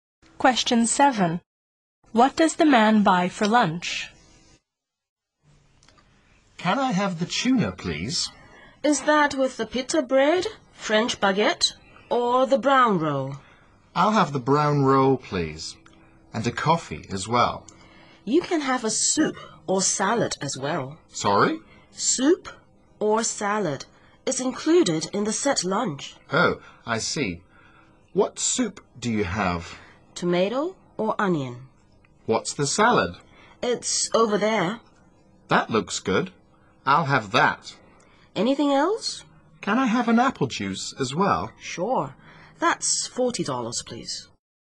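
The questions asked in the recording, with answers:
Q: What does the man buy for lunch?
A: Tuna on a brown roll, a coffee, a salad and an apple juice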